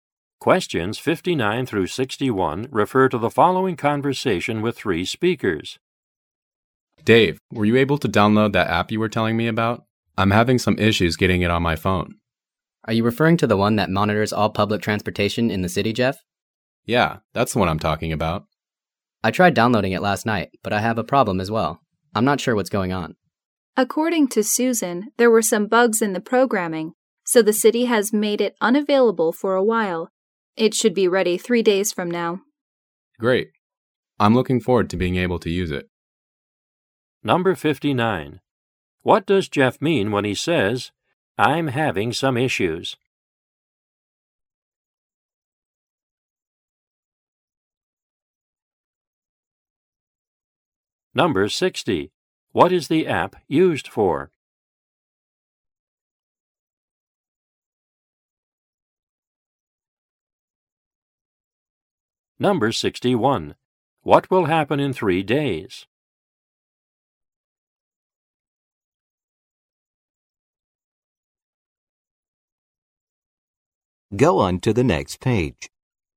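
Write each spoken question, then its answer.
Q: What does Jeff mean when he says, "I'm having some issues"?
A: He can't download the app to his phone

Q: What is the app used for?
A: Monitoring public transportation in the city

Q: What will happen in 3 days?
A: The app will be available again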